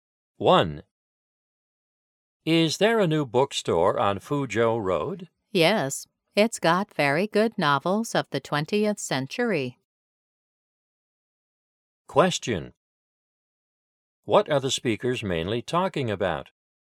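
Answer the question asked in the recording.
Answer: A new bookstore on Fuzhou Road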